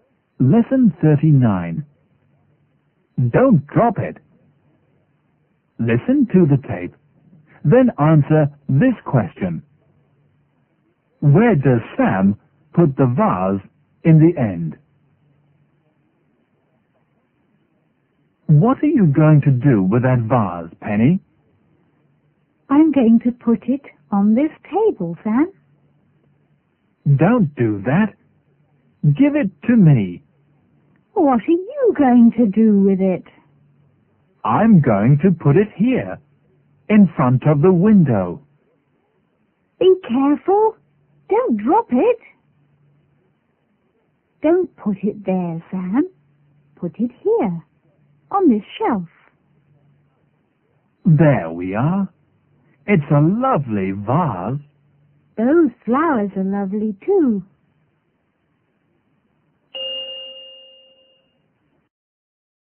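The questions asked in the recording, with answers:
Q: Where does Sam put the vase in the end?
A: On the shelf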